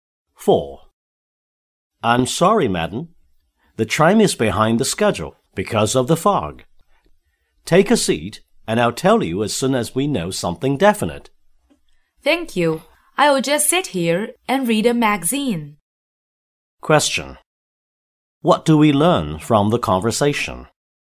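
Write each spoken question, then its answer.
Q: What do we learn from the conversation?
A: The tram is delayed by fog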